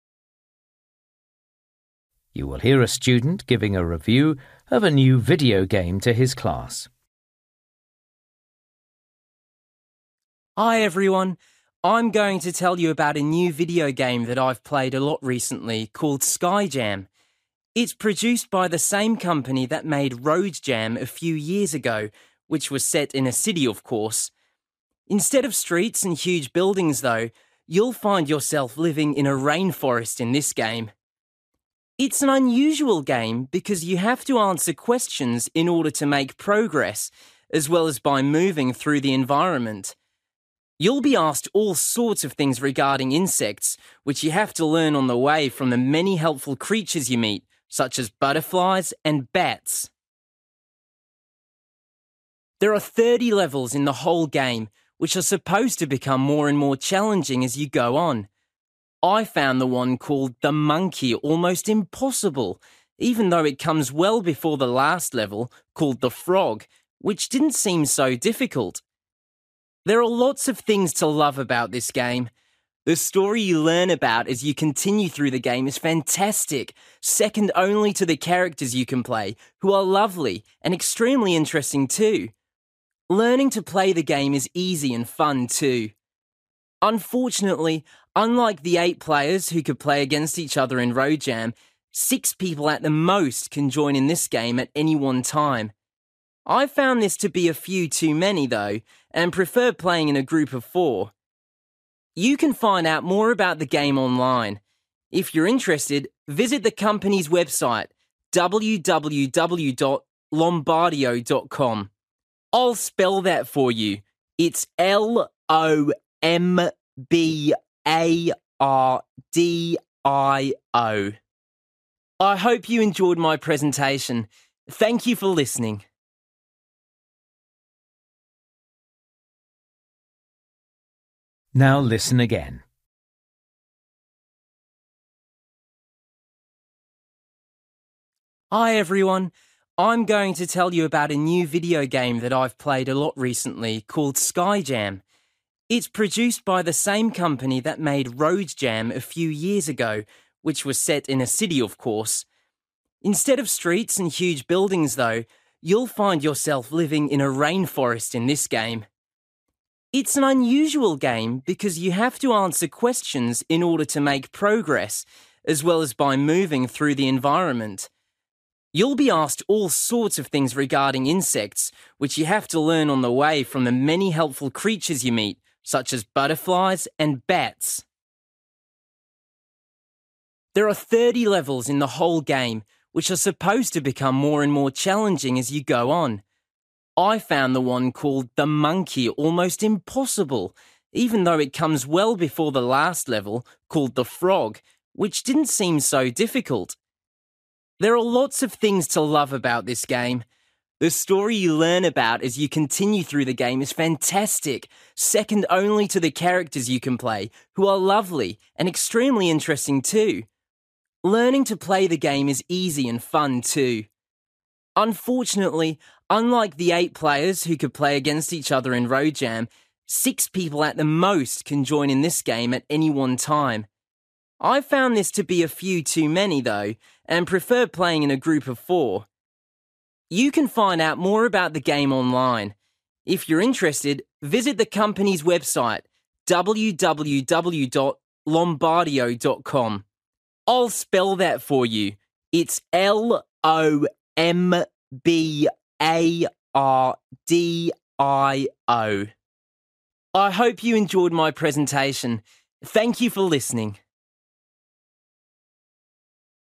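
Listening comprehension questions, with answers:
For each question, write the correct answer in the gap. Write one or two words or a number or a date or a time. You will hear a student giving a review of a new video game to his class.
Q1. Action takes place in: a (1)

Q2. Players answer questions about: (2)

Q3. Name of most difficult level of game: the (3)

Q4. Best thing about the game: the (4)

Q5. Maximum number of players: (5)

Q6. Website for more details: www.(6) .com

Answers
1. rainforest
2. insects
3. monkey
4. characters
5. 6
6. lombardio

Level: Luyện nghe trình độ B1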